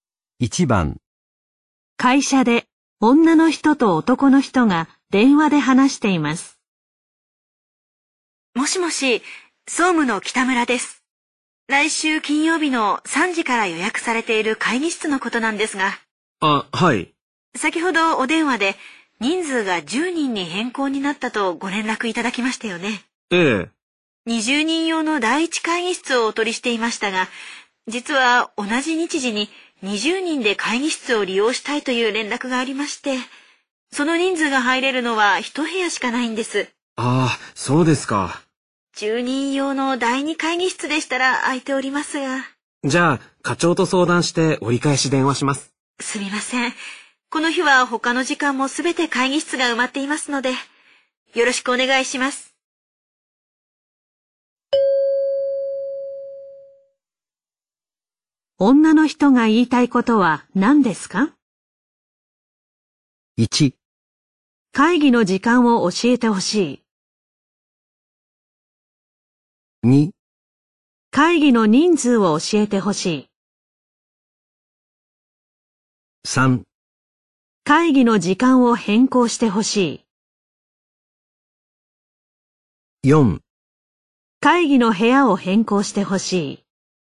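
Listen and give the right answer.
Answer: 4: 会議の部屋を変更してほしい。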